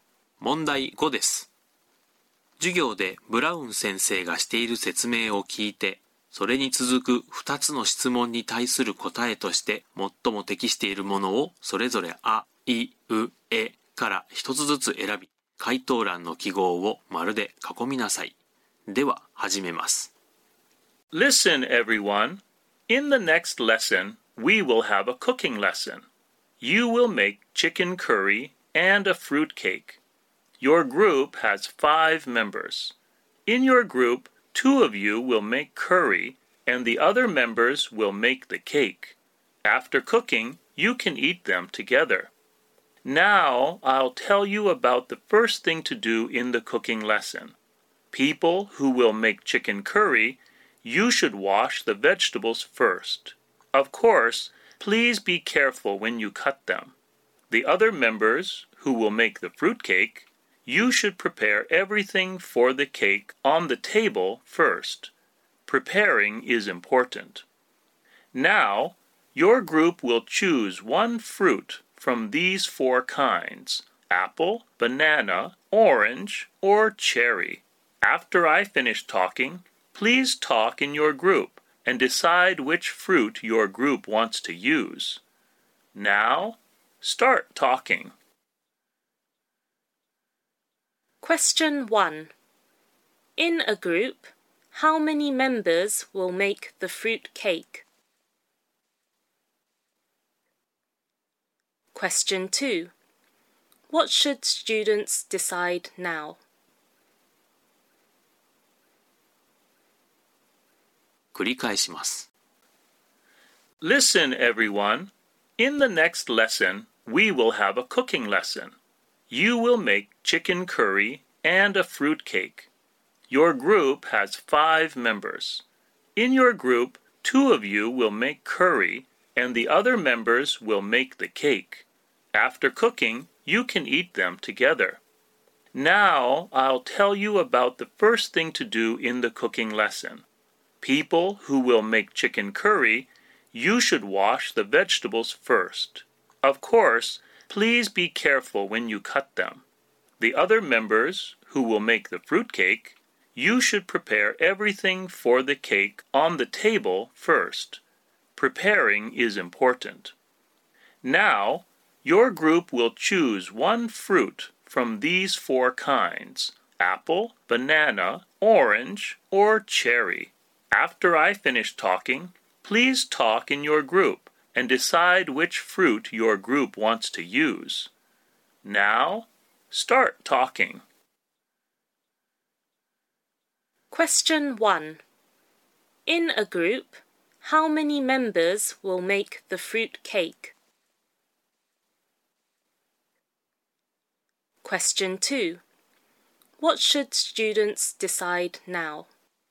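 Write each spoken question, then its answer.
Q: In a group, how many members will make the fruit cake?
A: Three

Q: What should students decide now?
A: Which fruit their group wants to use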